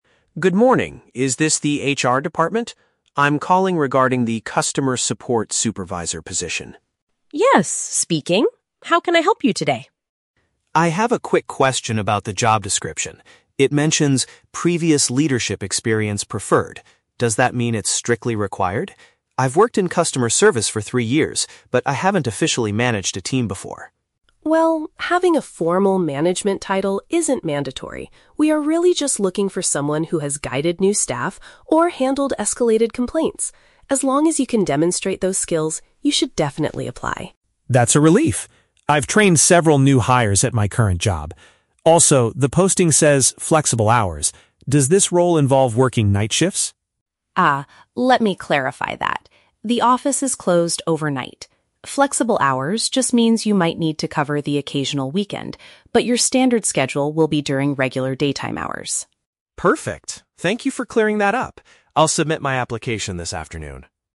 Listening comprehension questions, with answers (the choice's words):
Listen to the telephone conversation between a job applicant and an HR specialist. Choose the correct answer (A, B, or C) for each question.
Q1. What does the HR specialist clarify about the experience requirement?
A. Candidates must have exactly three years of customer service background.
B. Applicants do not need to have held a specific managerial job title.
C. Applicants must submit a letter of recommendation from their previous boss.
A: Applicants do not need to have held a specific managerial job title.

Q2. What relevant experience does the man already possess?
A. He has taught and assisted new employees.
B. He has officially managed a large department before.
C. He has resolved serious complaints from difficult customers.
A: He has taught and assisted new employees.

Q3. When will the successful candidate be expected to work?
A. Mostly late at night due to the flexible schedule.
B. Only on weekdays from the morning to the afternoon.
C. Mostly during the day, with some shifts on Saturdays or Sundays.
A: Mostly during the day, with some shifts on Saturdays or Sundays.

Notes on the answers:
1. Ms. Davis states that "having a formal management title isn't mandatory." Option (B) accurately paraphrases this (mandatory = need; formal title = specific job title). Option (A) is The Trap: Brian mentions he has worked in customer service for "three years", but the HR specialist does not say this exact number is a strict requirement for everyone. Option (C) is never mentioned.
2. Brian says "I've trained several new hires at my current job." Option (A) uses synonyms (taught and assisted = trained; new employees = new hires). Option (B) is The Trap: He explicitly states "I haven't officially managed a team before." Option (C) is also The Trap: Ms. Davis mentions "handled escalated complaints" as a good skill to have, but Brian does not confirm that he has done this; he only confirms training new hires.
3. Ms. Davis explains that the schedule will be "during regular daytime hours" and might include "the occasional weekend". Option (C) perfectly summarizes this. Option (A) is The Trap: Brian asks about "night shifts", but Ms. Davis clearly says "The office is closed overnight." Option (B) is incorrect because it excludes the required weekend work.

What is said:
Brian: Good morning, is this the HR department? I'm calling regarding the Customer Support Supervisor position.
Ms. Davis: Yes, speaking. How can I help you today?
Brian: I have a quick question about the job description. It mentions "previous leadership experience preferred." Does that mean it's strictly required? I've worked in customer service for three years, but I haven't officially managed a team before.
Davis: Well, having a formal management title isn't mandatory. We are really just looking for someone who has guided new staff or handled escalated complaints. As long as you can demonstrate those skills, you should definitely apply.
Brian: That's a relief! I've trained several new hires at my current job. Also, the posting says "flexible hours." Does this role involve working night shifts?
Davis: Ah, let me clarify that. The office is closed overnight. "Flexible hours" just means you might need to cover the occasional weekend, but your standard schedule will be during regular daytime hours.
Brian: Perfect. Thank you for clearing that up! I'll submit my application this afternoon.